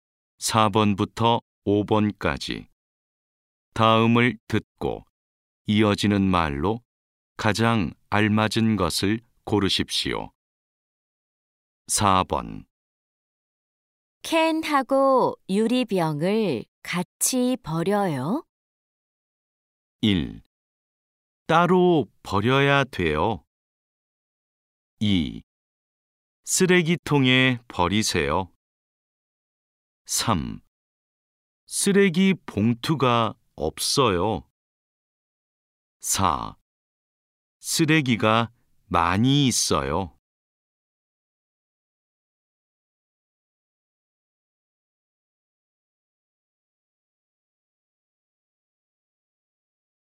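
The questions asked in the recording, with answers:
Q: 캔하고 유리병을 같이 버려요?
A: 1: 따로 버려야 돼요.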